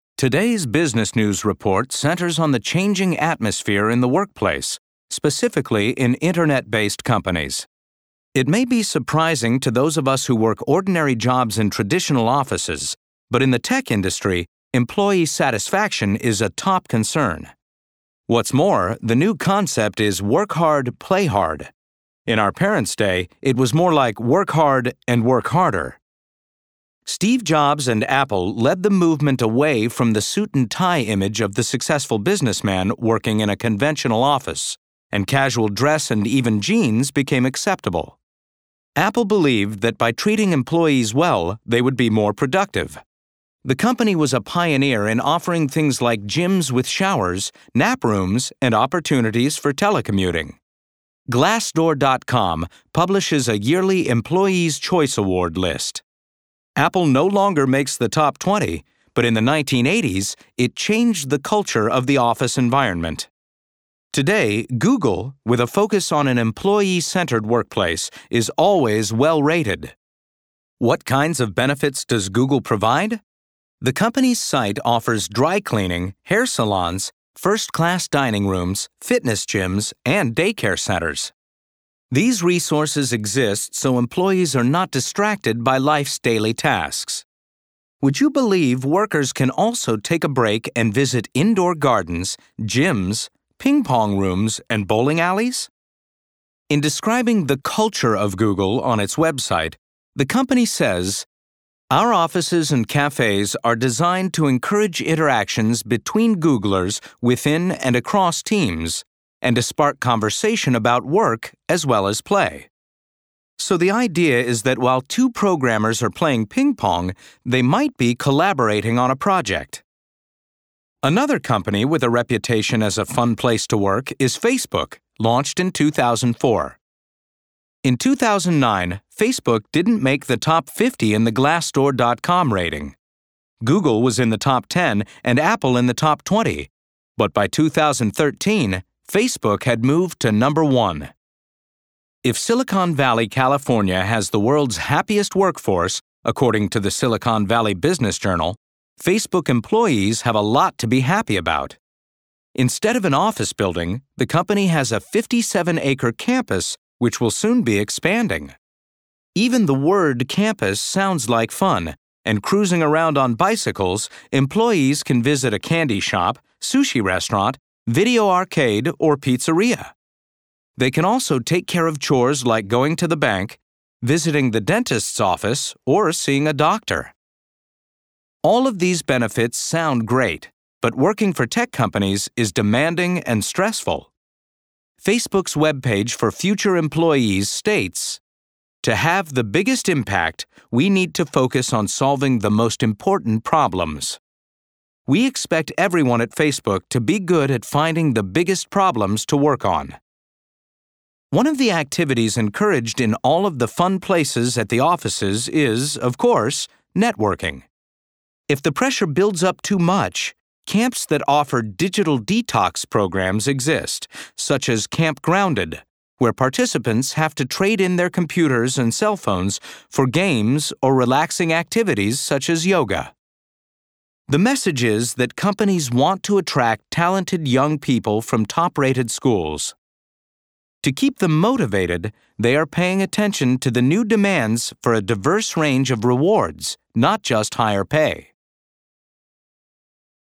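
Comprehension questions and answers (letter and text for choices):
In this section, you will hear a news report. You will hear the news report twice. Choose the best answer. Write A, B, or C in the provided box.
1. What is the main purpose of this news report?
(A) to show how tech businesses want to make working fun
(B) to show how businesses try to pay attention to workers' demands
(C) to show how Google and Facebook are the best places to work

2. What does the phrase 'work hard, play hard' mean in this report?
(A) that employees who are successful at work deserve good vacations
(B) that tech employees who work too hard need to go to camps to relax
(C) that workers in a relaxing environment are motivated to be more productive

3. Which company mentioned provided nap rooms and showers?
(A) Google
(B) Facebook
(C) Apple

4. Which is NOT mentioned as a reason for fitness gyms and ping pong at work?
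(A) gyms and game rooms are good places to network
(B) workers can collaborate while playing ping pong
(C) working out in a gym helps keep employees healthy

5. Which company had the top Employee's Choice Award rating in 2013?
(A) Google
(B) Facebook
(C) Apple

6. The speaker provides the example from the Silicon Valley Business Journal to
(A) support the idea that Silicon Valley has the happiest workforce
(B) explain that Silicon Valley has the most stressed out workforce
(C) prove that Silicon Valley has the highest paid workforce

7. According to the reporter, why do Google and Facebook provide banks or dentists?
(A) so employees are not distracted by tasks outside of work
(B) so employees are sure to get the appointments they need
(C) so employees can be called on to work extra hours when needed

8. What is NOT an example of what is provided in anti-stress camps such as Camp Grounded?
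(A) relaxing yoga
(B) games and special activities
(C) unlimited free Internet access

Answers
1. (B) to show how businesses try to pay attention to workers' demands
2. (C) that workers in a relaxing environment are motivated to be more productive
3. (C) Apple
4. (C) working out in a gym helps keep employees healthy
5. (B) Facebook
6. (A) support the idea that Silicon Valley has the happiest workforce
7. (A) so employees are not distracted by tasks outside of work
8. (C) unlimited free Internet access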